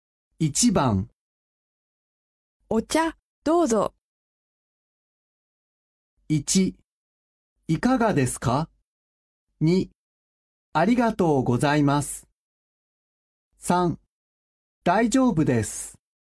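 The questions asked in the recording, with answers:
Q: お茶、どうぞ。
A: 2: ありがとうございます。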